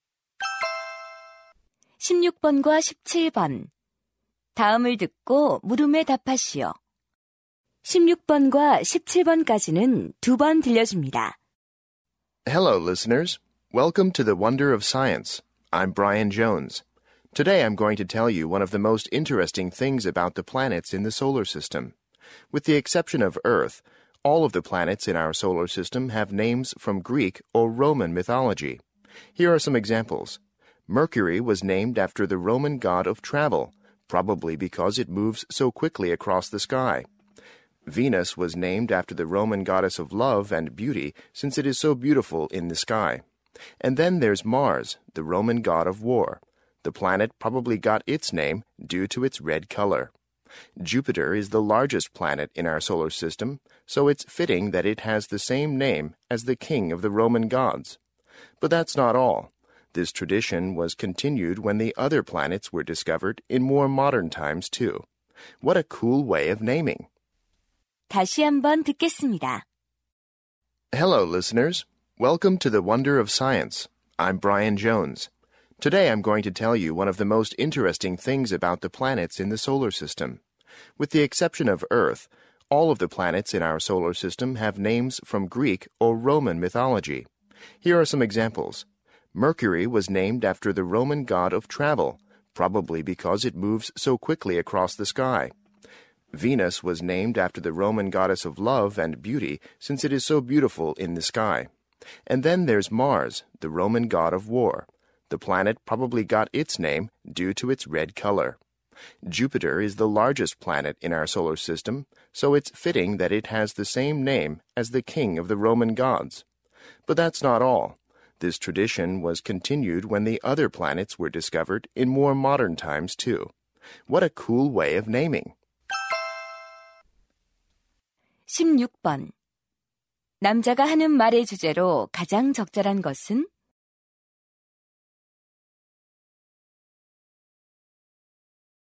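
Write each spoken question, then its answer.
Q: 남자가 하는 말의 주제로 가장 적절한 것은?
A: 태양계 행성 이름의 신화적 유래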